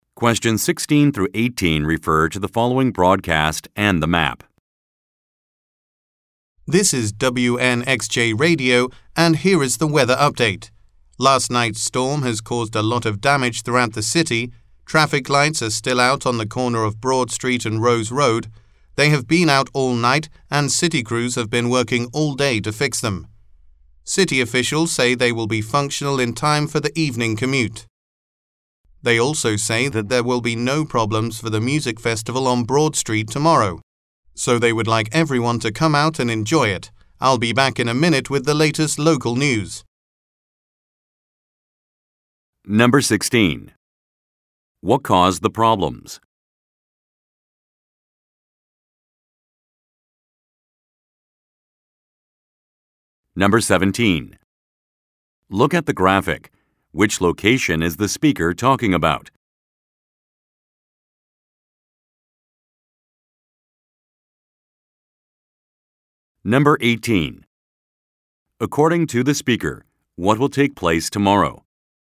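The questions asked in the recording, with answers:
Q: What caused the problems?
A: A storm

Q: According to the speaker, what will take place tomorrow?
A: A music festival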